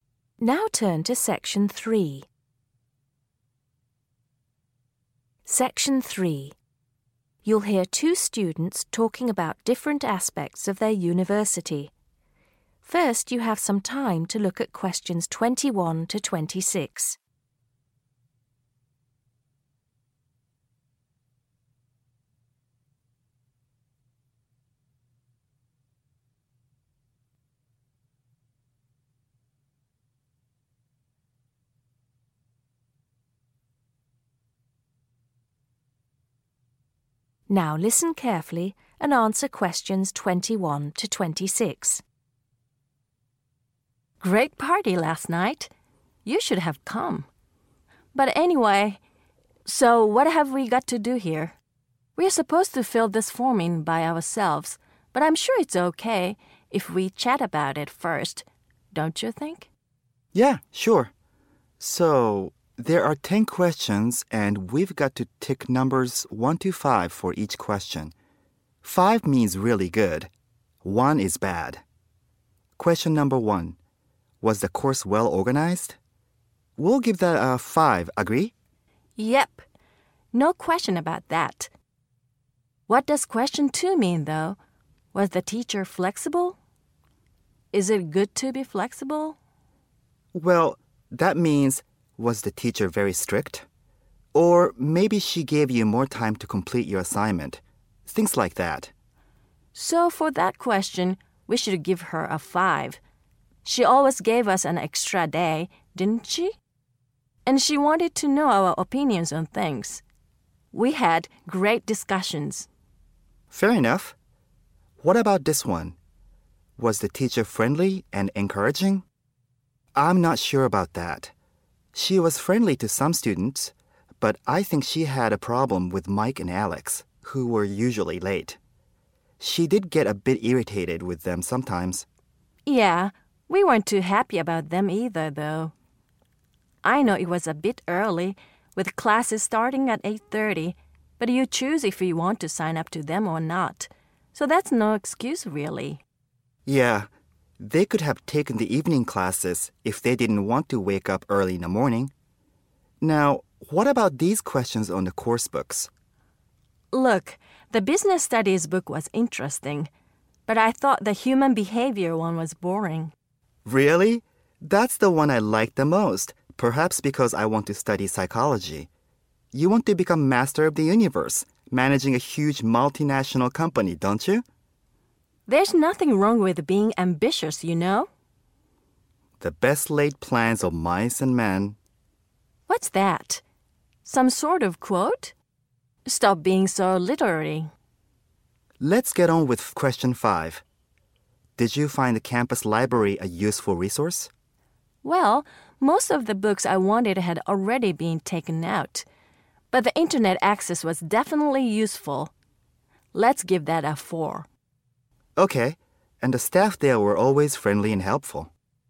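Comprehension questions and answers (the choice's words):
Choose the correct letter, A, B or C.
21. The students are meeting to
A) organise a party.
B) answer questions about a course.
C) decide on their studies.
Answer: answer questions about a course.

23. The college offered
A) only morning classes.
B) only evening classes.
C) both morning and evening classes.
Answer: both morning and evening classes.

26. Which of these was a problem with the campus library?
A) Books were not always available.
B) The people working there were unhelpful.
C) There were not enough computers.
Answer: Books were not always available.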